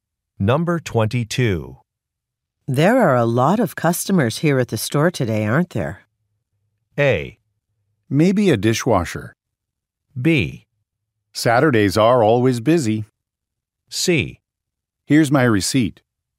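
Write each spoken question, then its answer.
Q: There are a lot of customers here at the store today, aren't there?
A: B: Saturdays are always busy.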